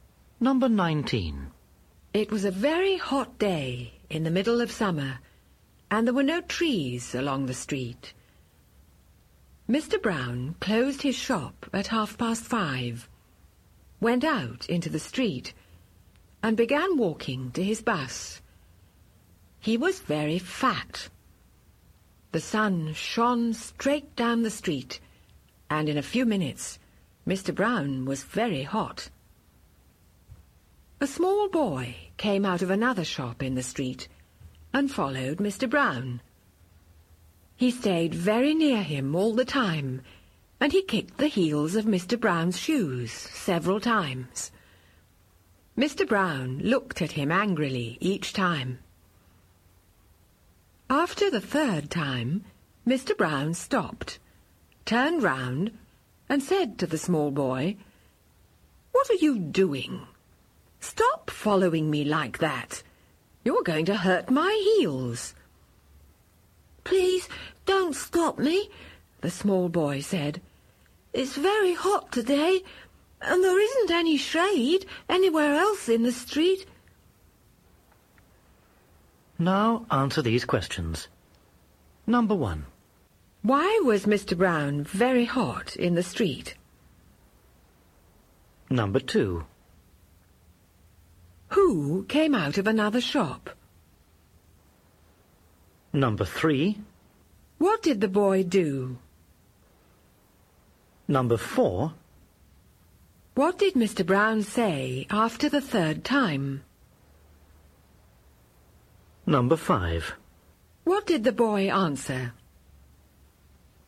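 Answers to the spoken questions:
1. Because the sun shone straight down the street, there were no trees, and he was very fat.
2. A small boy.
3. He followed Mr. Brown very closely and kicked the heels of his shoes.
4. "What are you doing? Stop following me like that. You're going to hurt my heels."
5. "Please don't stop me. It's very hot today, and there isn't any shade anywhere else in the street."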